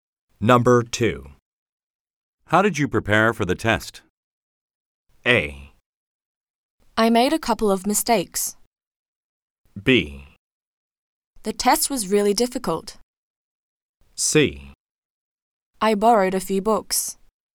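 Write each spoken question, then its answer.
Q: How did you prepare for the test?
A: C: I borrowed a few books.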